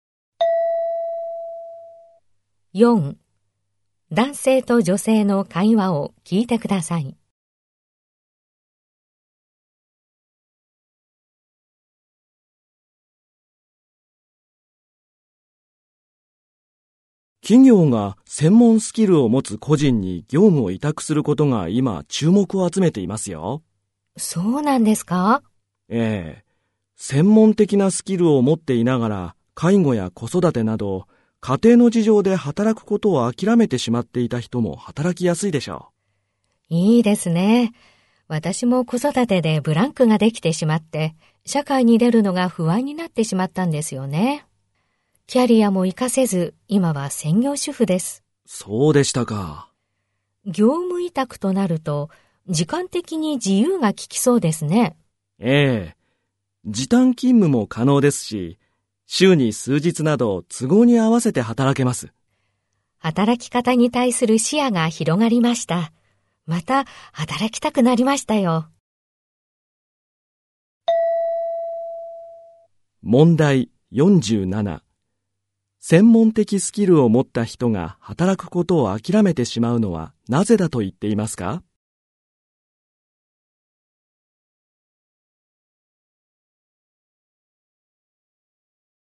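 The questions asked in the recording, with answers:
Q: 専門的スキルを持った人が働くことを諦めてしまうのはなぜだと言っていますか?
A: 介護や子育てなど家庭の事情のため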